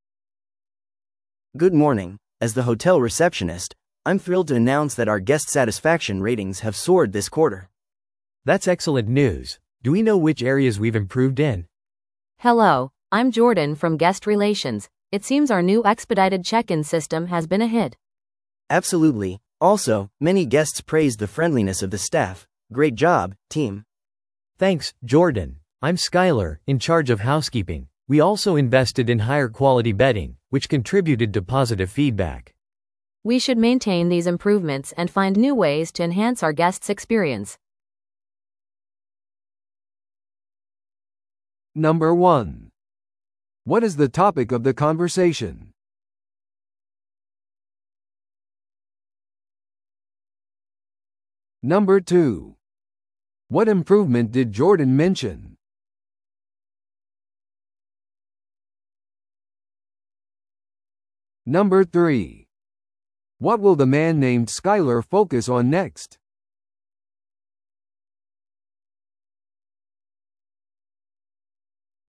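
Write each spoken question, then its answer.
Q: What is the topic of the conversation?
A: The hotel's improved guest satisfaction ratings

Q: What improvement did Jordan mention?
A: The new expedited check-in system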